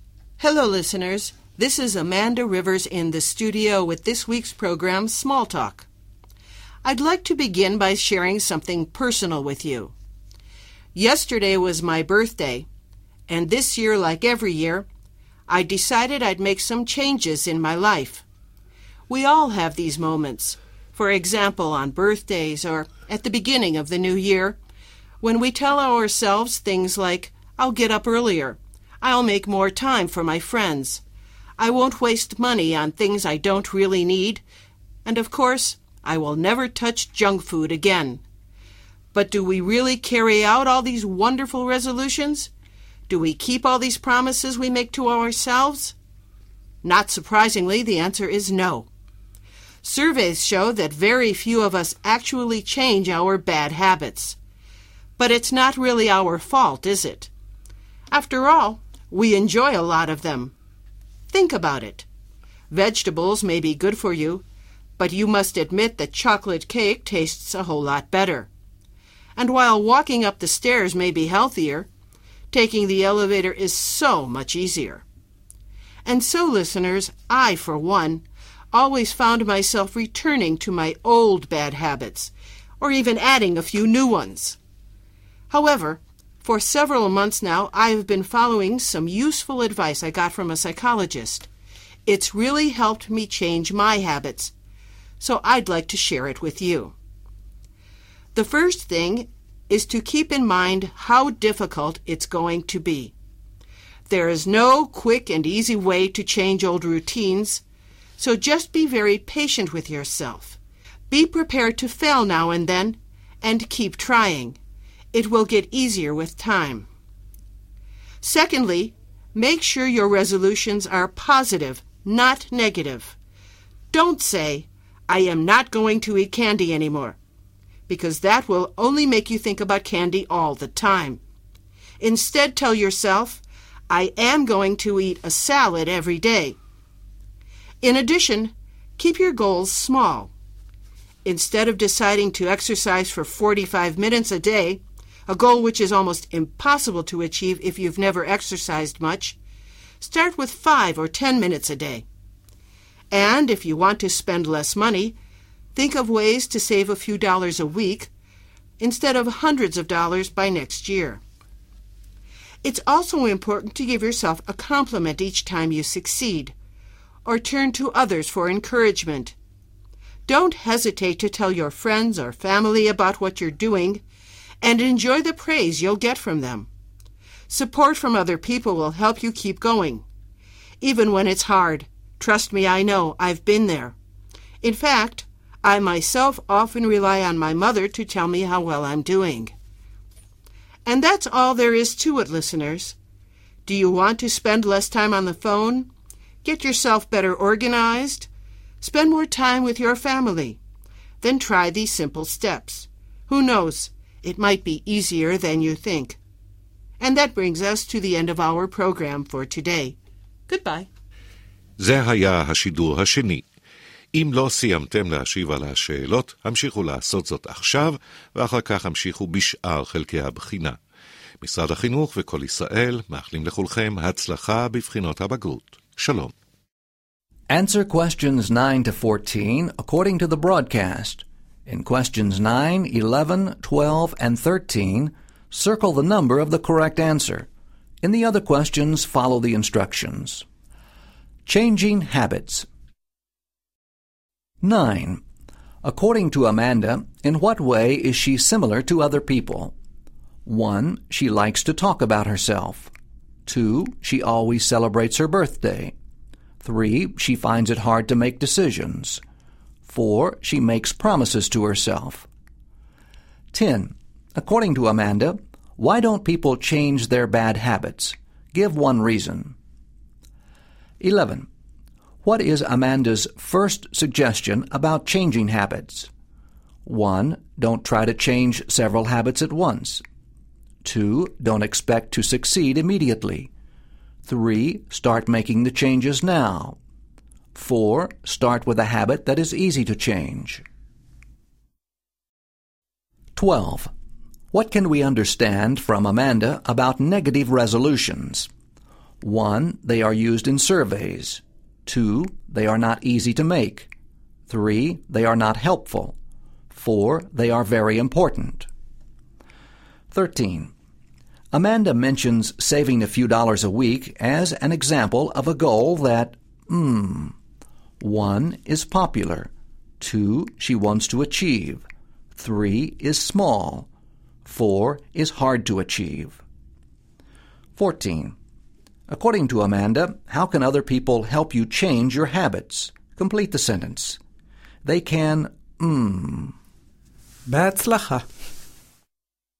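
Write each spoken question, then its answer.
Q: According to Amanda, in what way is she similar to other people?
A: 4: She makes promises to herself.

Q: According to Amanda, why don't people change their bad habits?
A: Because people enjoy many of their bad habits.

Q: What is Amanda's first suggestion about changing habits?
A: 2: Don't expect to succeed immediately.

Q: What can we understand from Amanda about negative resolutions?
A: 3: They are not helpful.

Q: Amanda mentions saving a few dollars a week as an example of a goal that,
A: 3: Is small.

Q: According to Amanda, how can other people help you change your habits?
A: They can encourage and praise you.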